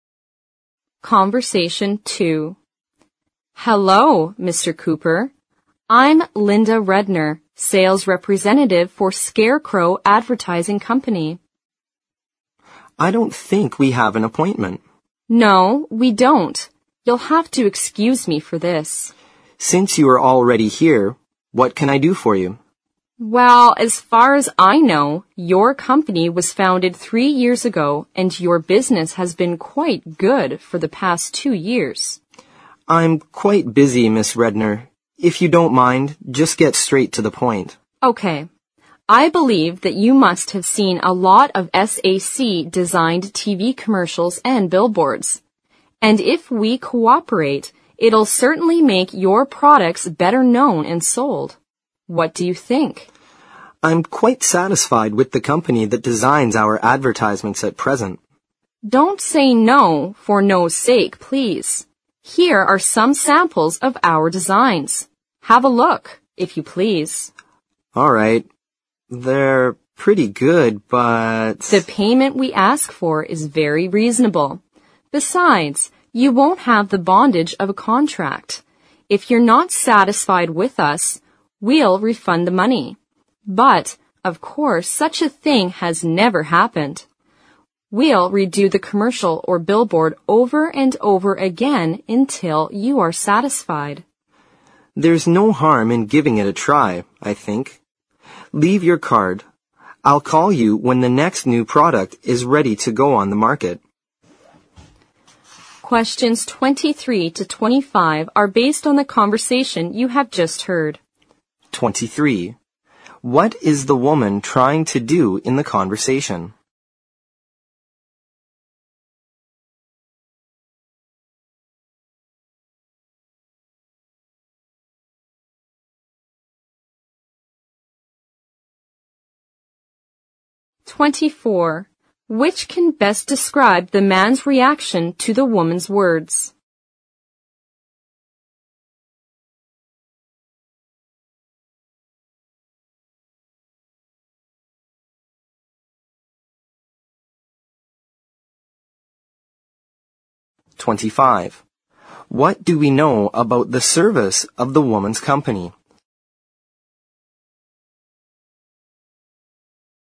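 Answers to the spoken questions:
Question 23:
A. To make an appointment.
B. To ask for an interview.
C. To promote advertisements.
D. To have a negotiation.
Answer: C. To promote advertisements.
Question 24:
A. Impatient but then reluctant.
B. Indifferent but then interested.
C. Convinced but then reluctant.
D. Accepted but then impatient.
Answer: B. Indifferent but then interested.
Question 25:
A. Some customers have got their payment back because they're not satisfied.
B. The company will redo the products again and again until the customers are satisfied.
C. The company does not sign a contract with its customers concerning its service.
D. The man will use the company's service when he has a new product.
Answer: B. The company will redo the products again and again until the customers are satisfied.

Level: 四级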